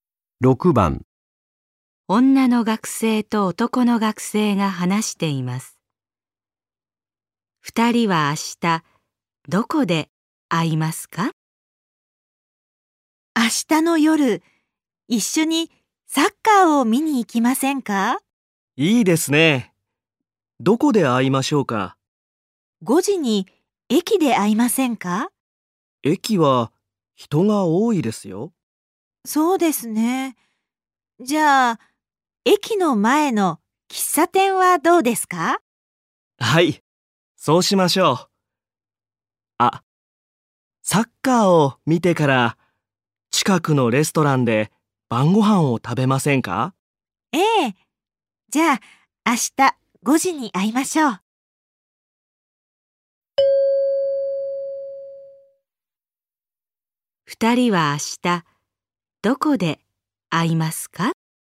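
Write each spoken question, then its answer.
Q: 二人は明日どこで会いますか?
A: 駅の前の喫茶店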